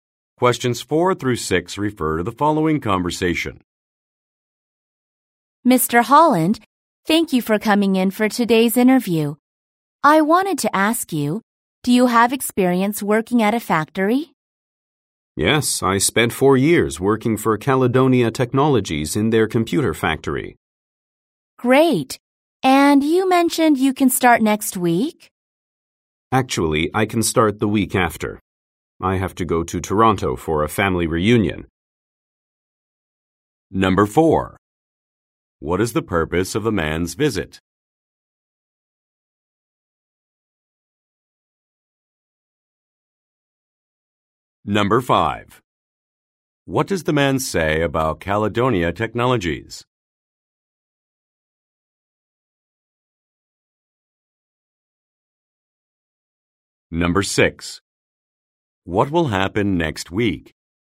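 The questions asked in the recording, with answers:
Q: What is the purpose of the man's visit?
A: A job interview

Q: What does the man say about Caledonia Technologies?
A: He worked in their computer factory for 4 years

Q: What will happen next week?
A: The man will go to a family reunion in Toronto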